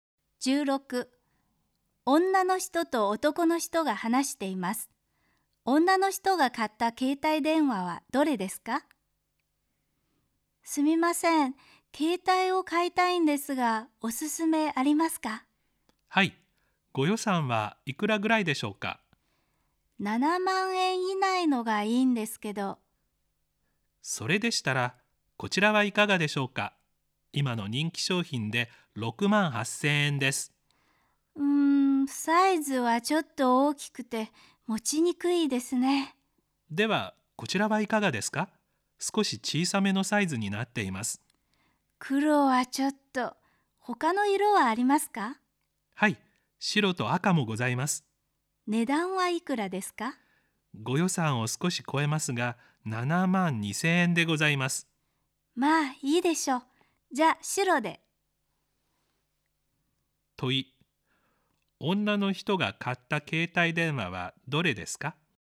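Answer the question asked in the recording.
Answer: 少し小さめで7万2000円の白い携帯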